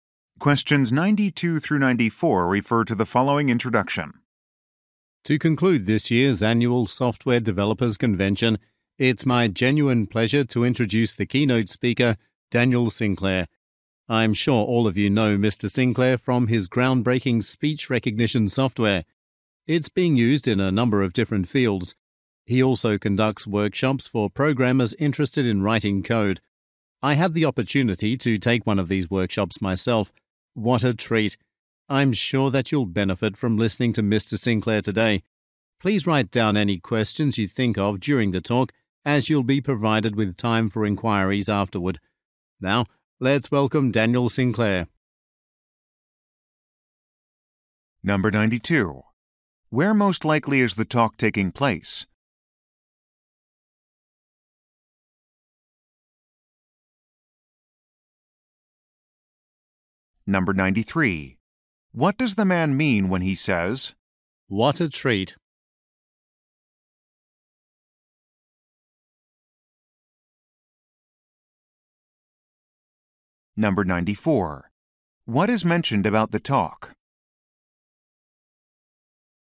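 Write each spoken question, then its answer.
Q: Where most likely is the talk taking place?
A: At a software developers convention

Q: What is mentioned about the talk?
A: There will be time for questions afterward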